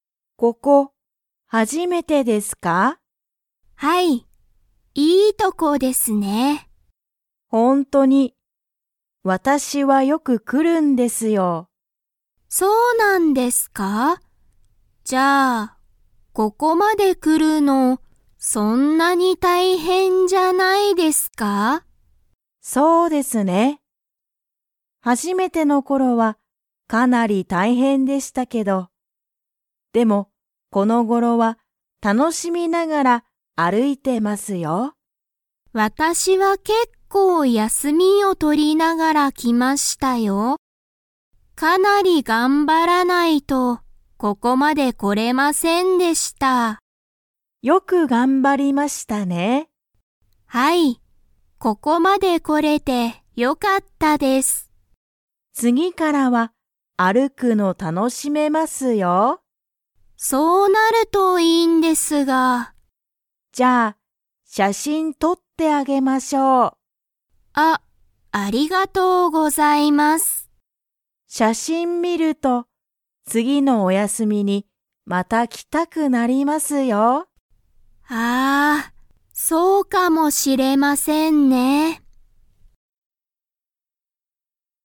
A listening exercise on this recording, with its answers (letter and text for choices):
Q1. ハルは、どこに初(はじ)めて来(き)ましたか?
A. 山(やま)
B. 会社(かいしゃ)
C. 学校(がっこう)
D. レストラン)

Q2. ハルは、その人(ひと)に、写真(しゃしん)を____。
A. とってもらった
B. とってもらわなかった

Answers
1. A. 山(やま)
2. A. とってもらった